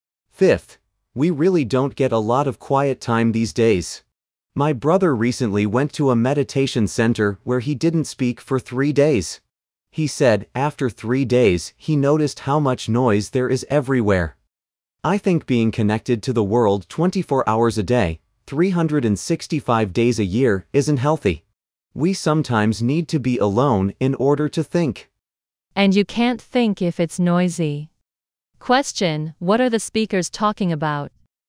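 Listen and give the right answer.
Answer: The need for quiet time away from noise and constant connection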